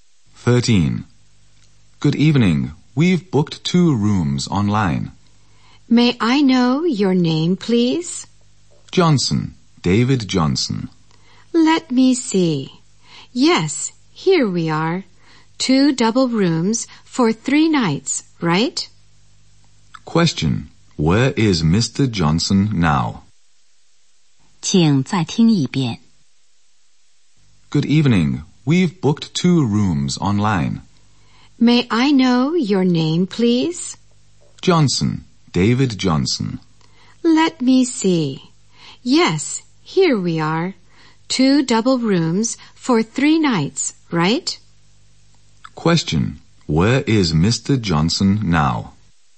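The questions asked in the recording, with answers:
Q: Where is Mr. Johnson now?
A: At a hotel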